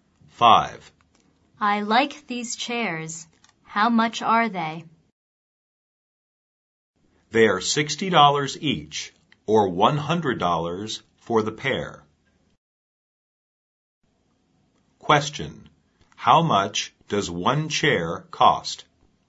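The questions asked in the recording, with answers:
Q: How much does one chair cost?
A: $60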